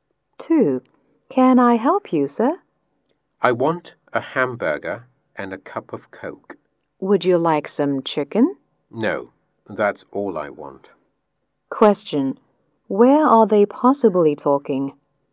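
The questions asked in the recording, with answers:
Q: Where are they possibly talking?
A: At a fast food restaurant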